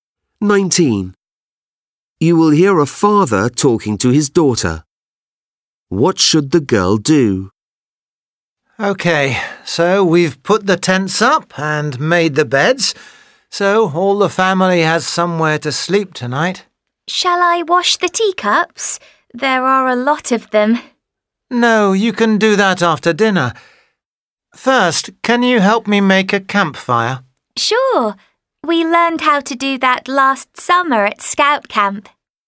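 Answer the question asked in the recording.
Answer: Help make a campfire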